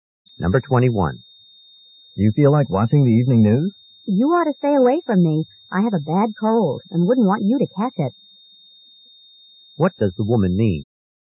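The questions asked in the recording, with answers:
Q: What does the woman mean?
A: She doesn't want to give him her cold.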